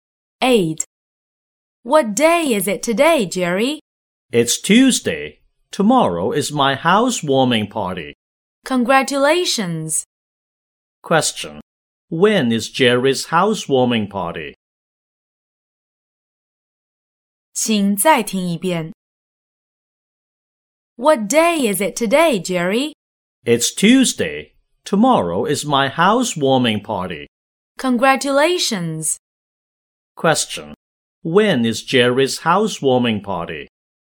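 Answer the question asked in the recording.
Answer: On Wednesday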